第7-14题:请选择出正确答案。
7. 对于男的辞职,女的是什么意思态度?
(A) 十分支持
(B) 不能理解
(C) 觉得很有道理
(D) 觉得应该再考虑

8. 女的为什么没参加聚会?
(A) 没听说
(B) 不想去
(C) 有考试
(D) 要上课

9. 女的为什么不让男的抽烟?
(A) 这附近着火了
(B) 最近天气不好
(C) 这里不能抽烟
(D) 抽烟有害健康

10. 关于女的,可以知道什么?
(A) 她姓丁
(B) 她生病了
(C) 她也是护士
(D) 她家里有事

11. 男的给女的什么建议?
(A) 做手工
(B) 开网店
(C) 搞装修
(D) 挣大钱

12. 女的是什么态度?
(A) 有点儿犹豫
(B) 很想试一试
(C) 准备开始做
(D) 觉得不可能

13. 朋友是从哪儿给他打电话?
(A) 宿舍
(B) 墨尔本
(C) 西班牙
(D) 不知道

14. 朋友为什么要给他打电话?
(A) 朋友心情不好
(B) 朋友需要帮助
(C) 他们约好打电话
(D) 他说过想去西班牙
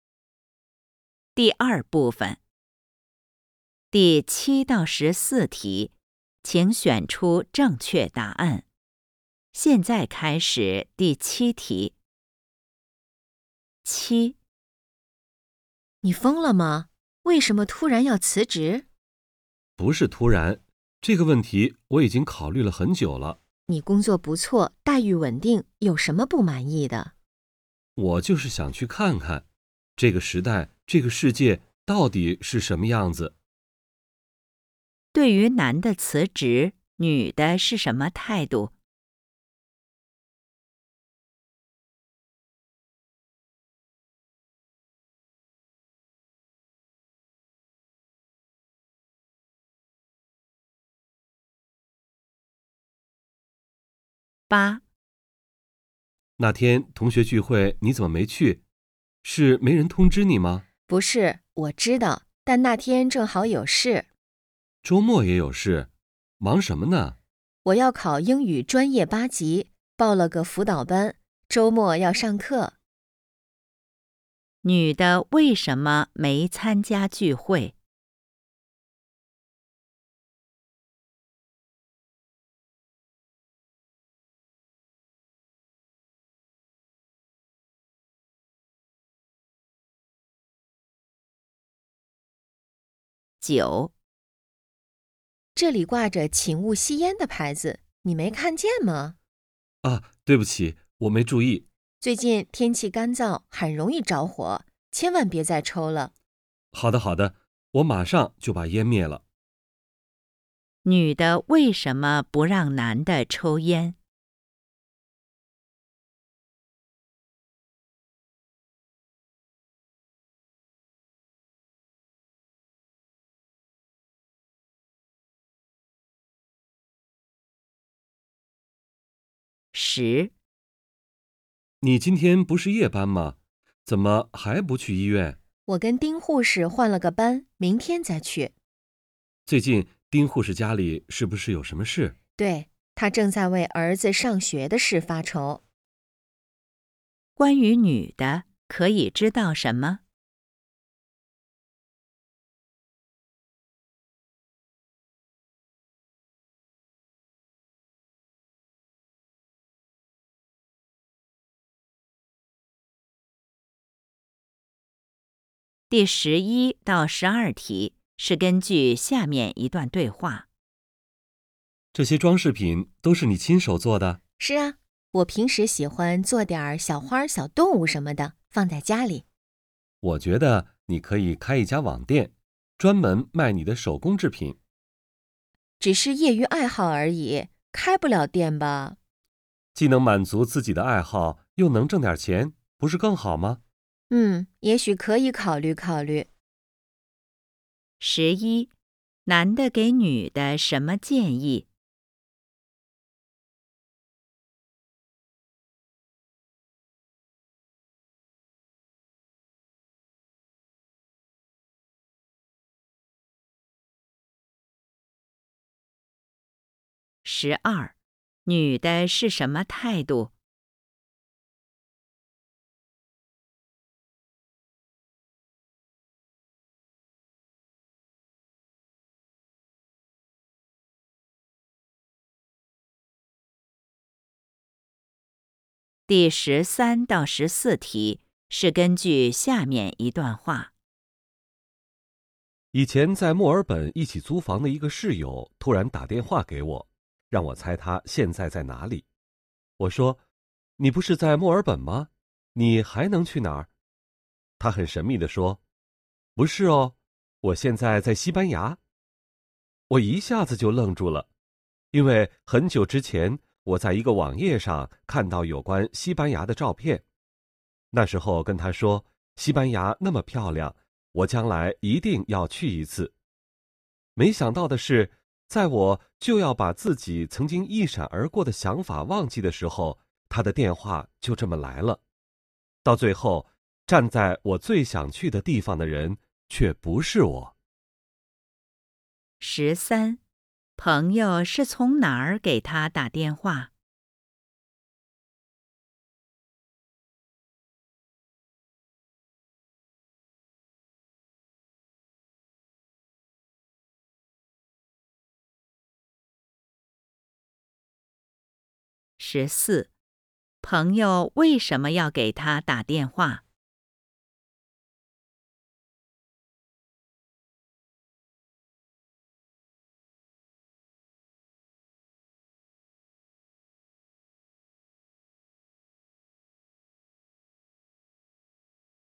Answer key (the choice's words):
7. 不能理解
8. 要上课
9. 这里不能抽烟
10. 她也是护士
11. 开网店
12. 有点儿犹豫
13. 西班牙
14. 他说过想去西班牙

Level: HSK 5